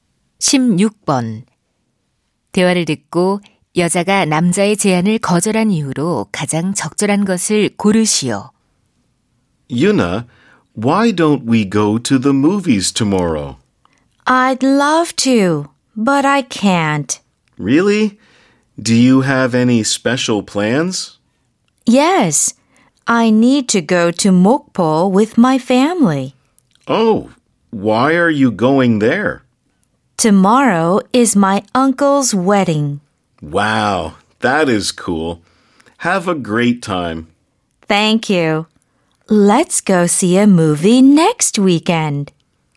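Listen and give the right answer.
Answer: 삼촌 결혼식에 가야 해서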